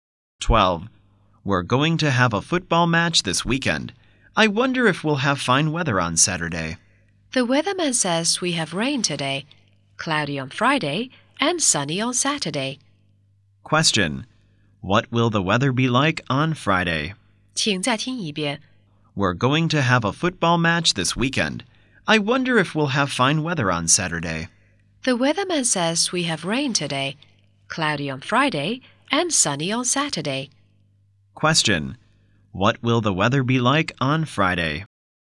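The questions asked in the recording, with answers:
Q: Question. What will the weather be like on Friday?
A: Cloudy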